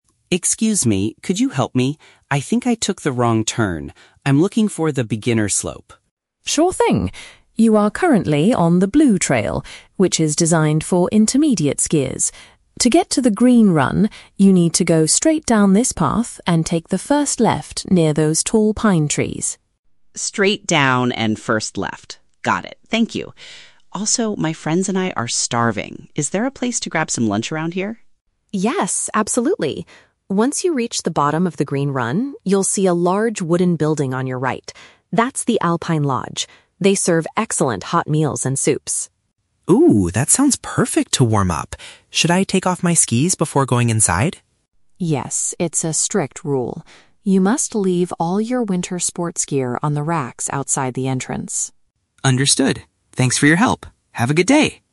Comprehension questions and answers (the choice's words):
Listen to the conversation between a skier and a ski patrol member. Choose the correct answer (A, B, or C) for each question.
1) What is the skier's main problem at the beginning of the conversation?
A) He injured his leg while riding on the intermediate trail.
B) He got lost and needs to find the easiest skiing area.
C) He dropped his trail map while riding the ski lift.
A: He got lost and needs to find the easiest skiing area.

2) Where is the nearest restaurant located?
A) Right next to the tall pine trees on the blue trail.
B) Inside the main rescue center at the top of the mountain.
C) At the end of the beginner slope, inside a wooden structure.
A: At the end of the beginner slope, inside a wooden structure.

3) What does the ski patrol remind the skier to do at the lodge?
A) To remove his physical equipment before entering the building.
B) To pay for his hot meals and soups using cash only.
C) To wait outside until a staff member calls his name.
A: To remove his physical equipment before entering the building.

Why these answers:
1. The skier says, "I think I took the wrong turn. I'm looking for the beginner slope." "Took the wrong turn" means he got lost, and the "beginner slope" is the easiest skiing area. Why the traps are wrong: Option A is a trap; the patrol mentions he is on the trail for "intermediate skiers," but the skier never says he is injured. Option C is a plausible real-world situation, but dropping a map is never mentioned.
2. The patrol says the Alpine Lodge (restaurant) is at "the bottom of the green run" and is a "large wooden building." "Bottom" matches the "end" of the slope, and "green run" is the beginner slope. Why the traps are wrong: Option A is a trap; the "tall pine trees" are where the skier needs to turn left, not where the restaurant is. Option B is not mentioned in the audio.
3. The skier asks if he should "take off my skis," and the patrol confirms he must leave "all your winter sports gear" outside. Option A perfectly paraphrases this as removing his "physical equipment" before entering. Why the traps are wrong: Option B is a trap; the audio mentions "hot meals and soups," but there is no discussion about how to pay for them (cash). Option C is not mentioned at all.

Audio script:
Skier: Excuse me! Could you help me? I think I took the wrong turn. I'm looking for the beginner slope.
Patrol: Sure thing. You are currently on the blue trail, which is designed for intermediate skiers. To get to the green run, you need to go straight down this path and take the first left near those tall pine trees.
Skier: Straight down and first left. Got it. Thank you. Also, my friends and I are starving. Is there a place to grab some lunch around here?
Patrol: Yes, absolutely. Once you reach the bottom of the green run, you'll see a large wooden building on your right. That's the Alpine Lodge. They serve excellent hot meals and soups.
Skier: Oh, that sounds perfect to warm up. Should I take off my skis before going inside?
Patrol: Yes, it's a strict rule. You must leave all your winter sports gear on the racks outside the entrance.